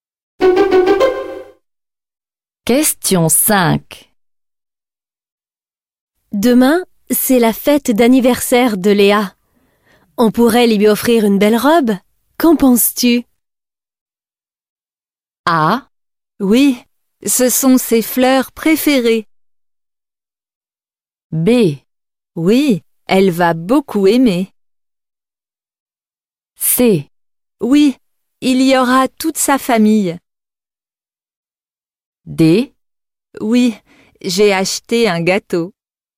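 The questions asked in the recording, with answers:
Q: Qu'en penses-tu?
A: B: Oui, elle va beaucoup aimer.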